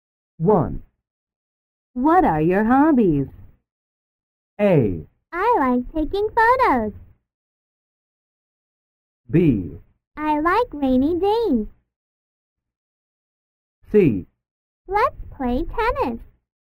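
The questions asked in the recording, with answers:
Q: What are your hobbies?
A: A: I like taking photos.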